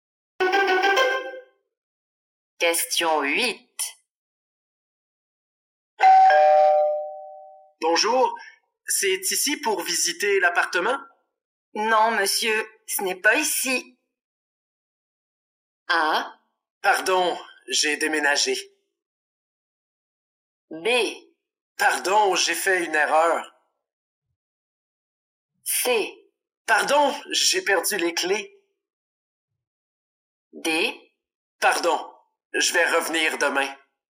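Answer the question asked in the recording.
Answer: B: Pardon, j'ai fait une erreur.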